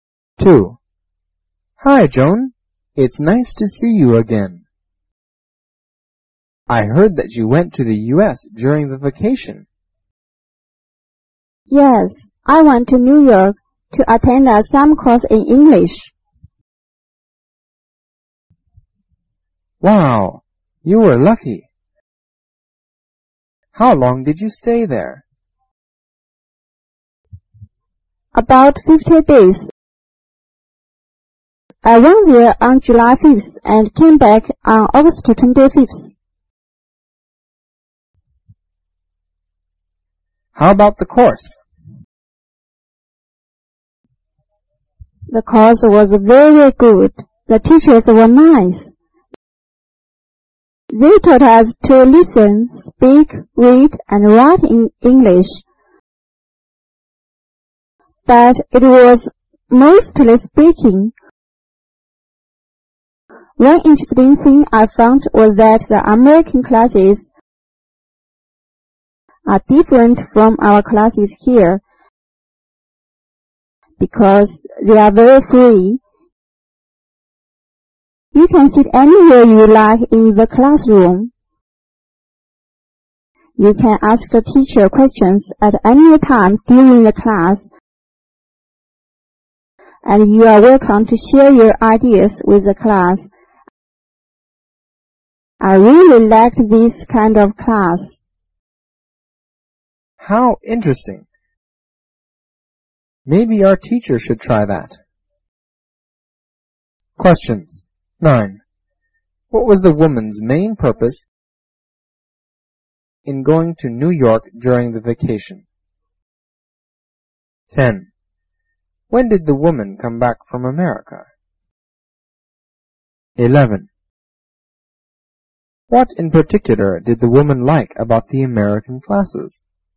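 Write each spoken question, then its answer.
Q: What was the woman's main purpose in going to New York during the vacation?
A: To attend a summer course in English

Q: When did the woman come back from America?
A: On August 25th

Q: What in particular did the woman like about the American classes?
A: They are very free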